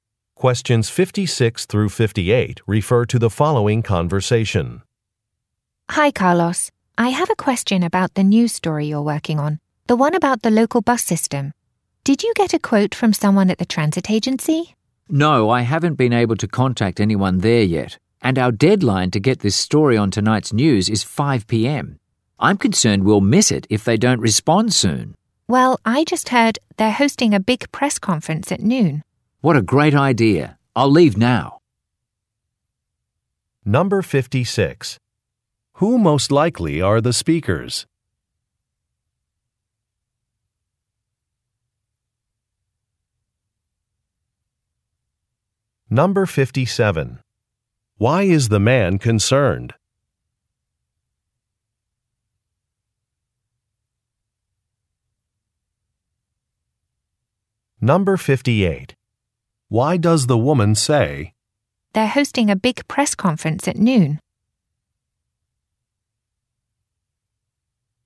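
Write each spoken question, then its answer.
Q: Who most likely are the speakers?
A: News reporters

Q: Why is the man concerned?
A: He may miss a deadline

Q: Why does the woman say,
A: To suggest he get a quote at the press conference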